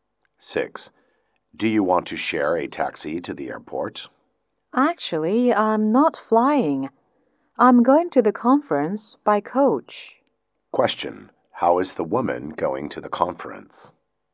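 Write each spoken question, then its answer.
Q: How is the woman going to the conference?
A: By coach.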